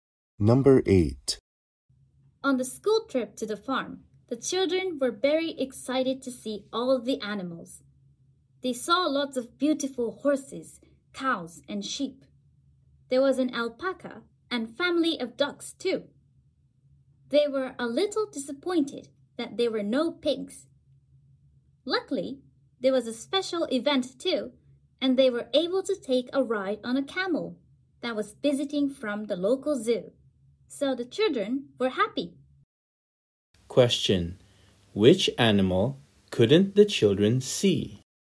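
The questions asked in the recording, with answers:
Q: Question: Which animal couldn't the children see?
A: Pigs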